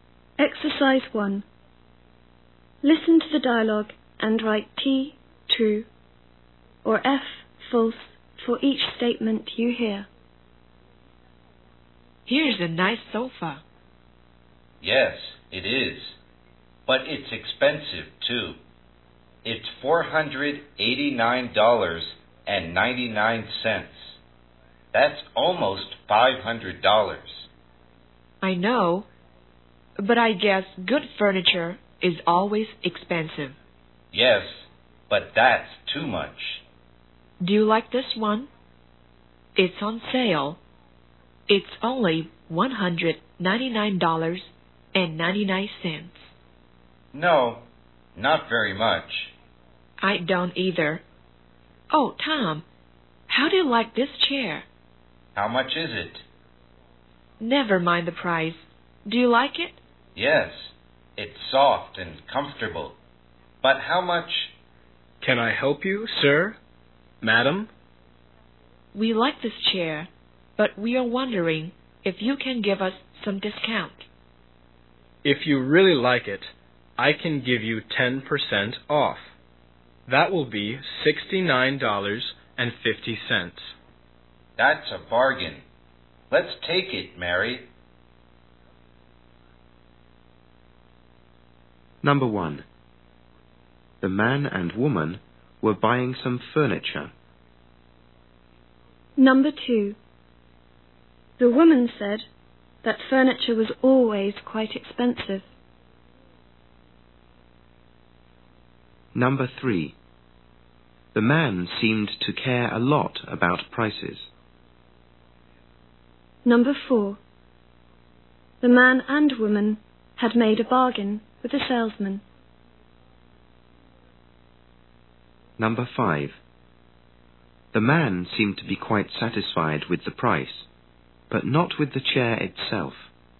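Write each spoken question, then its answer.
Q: The man and woman were buying some furniture.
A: True

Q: The man seemed to be quite satisfied with the price, but not with the chair itself.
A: False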